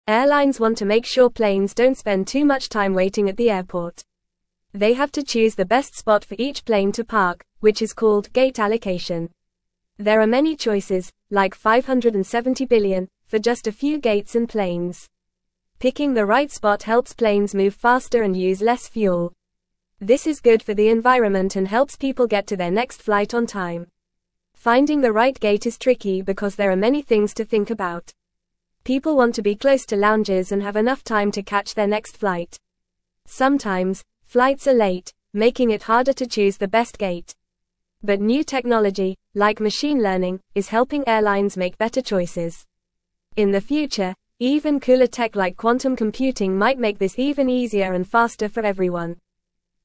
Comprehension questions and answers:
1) Airlines want to make (1)______ planes don't spend too much time waiting at the airport.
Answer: sure

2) They have to choose the best spot for each plane to park, which is (2)______ gate allocation.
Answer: called

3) This is good for the environment and helps people get to their next flight on (3)______.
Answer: time

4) (4)______ the right gate is tricky because there are many (5)______ to think about.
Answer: Finding

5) (4)______ the right gate is tricky because there are many (5)______ to think about.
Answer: things

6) People want to be close to lounges and have (6)______ time to catch their next flight.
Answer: enough

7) But new technology, like machine learning, is helping airlines (7)______ (8)______ choices.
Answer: make

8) But new technology, like machine learning, is helping airlines (7)______ (8)______ choices.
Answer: better

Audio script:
Airlines want to make sure planes don't spend too much time waiting at the airport. They have to choose the best spot for each plane to park, which is called gate allocation. There are many choices, like 570 billion, for just a few gates and planes! Picking the right spot helps planes move faster and use less fuel. This is good for the environment and helps people get to their next flight on time.
Finding the right gate is tricky because there are many things to think about. People want to be close to lounges and have enough time to catch their next flight. Sometimes, flights are late, making it harder to choose the best gate. But new technology, like machine learning, is helping airlines make better choices. In the future, even cooler tech like quantum computing might make this even easier and faster for everyone.

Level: Level 1